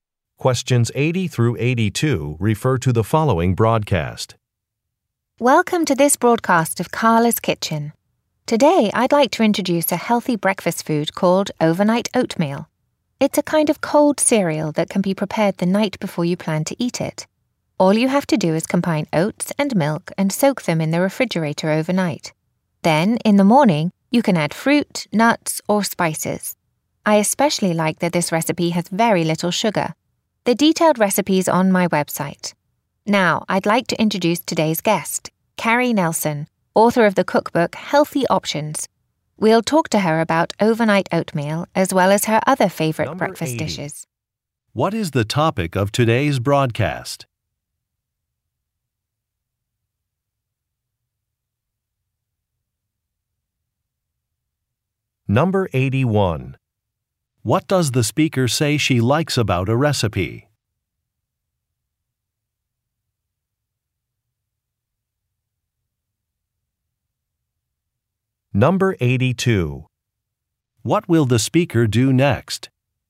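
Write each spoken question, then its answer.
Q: What is the topic of today's broadcast?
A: A healthy breakfast food (overnight oatmeal)

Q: What does the speaker say she likes about a recipe?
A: It has very little sugar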